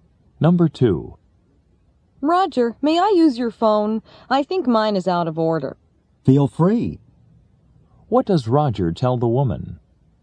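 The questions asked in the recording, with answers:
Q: What does Roger tell the woman?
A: She may use his phone.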